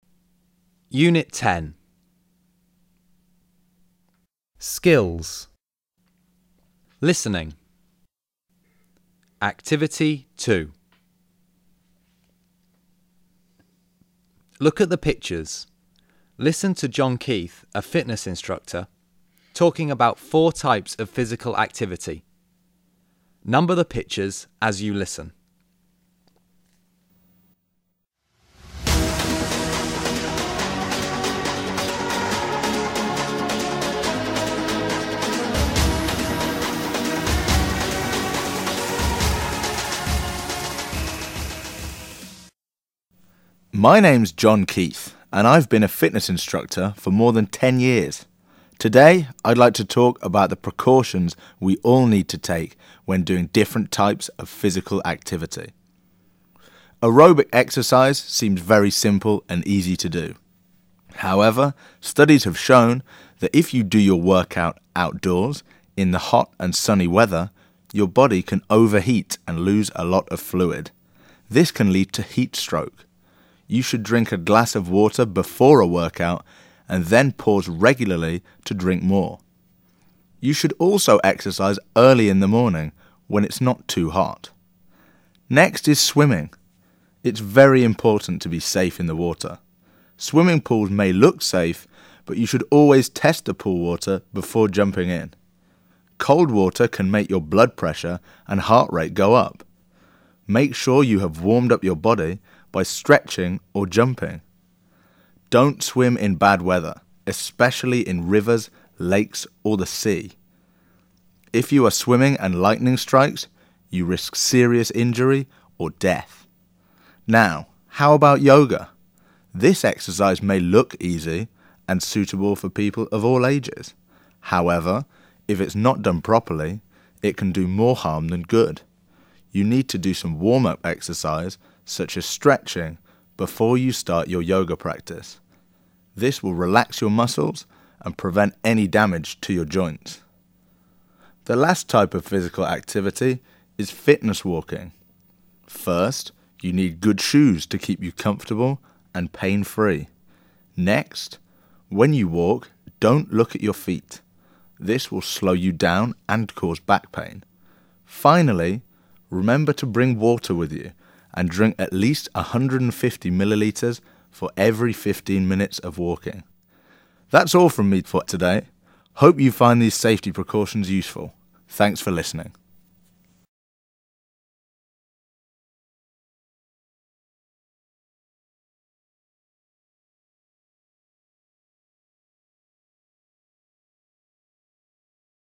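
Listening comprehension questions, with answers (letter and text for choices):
3. Listen again. Which safety rules are mentioned to each type of physical activity? Tick the correct boxes.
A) aerobic exercise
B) swimming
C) yoga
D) fitness walking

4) You should check if the water is too cold.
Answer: B) swimming

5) Stretching and relaxing your muscles will help prevent joint damage.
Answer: C) yoga

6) You need comfortable shoes.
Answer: D) fitness walking

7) Looking at your feet will slow you down and cause back pain.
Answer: D) fitness walking

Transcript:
My name's John Keith and I've been a fitness instructor for more than ten years. Today I'd like to talk about the precautions we all need to take when doing different types of physical activity.
Aerobic exercise seems very simple and easy to do. However, studies have shown that if you do your workout outdoors in the hot and sunny weather, your body can overheat and lose a lot of fluid. 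This can lead to heat stroke. You should drink a glass of water before a workout and then pase regularly to drink more. You should also exercise early in the morning when it's not too hot.
Next IS swimming. It's verv important to be safe in the water. Swimming pools may look safe, but you should always test the pool water before jumping in. Cold water can make your blood pressure and heart rate go up. Make sure you have warmed up your body by stretching or jumping. Don't swim in bad weather, especially in rivers, lakes or the sea. If you are swimming and lightning strikes, vou risk serious injury or death.
Now, how about yoga? This exercise may look easy and suitable for people of all ages. However, if it's not done properly, it can do more harm than good. You need to do some warm-up exercise such as stretching before you start your yoga practice. This will relax your muscles and prevent any damage to your joints.
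The last type of physical activity is fitness walking. First, you need good shoes to keep you comfortable and pain-free. Next, when you walk, don't look at your feet. This will slow you down and cause back pain. Finally, remember to bring water with you and drink at least 150 ml for every 15 minutes of walking.
That's all from me for today. Hope you find these safety precautions useful. Thanks for listening.

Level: Unit 10 lớp 11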